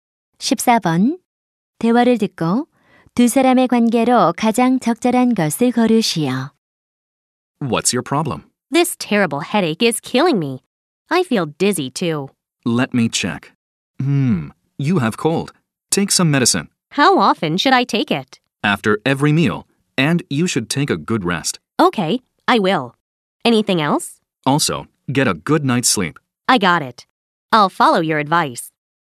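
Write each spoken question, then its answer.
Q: 대화를 듣고 두 사람의 관계로 가장 적절한 것을 고르시오.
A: 의사와 환자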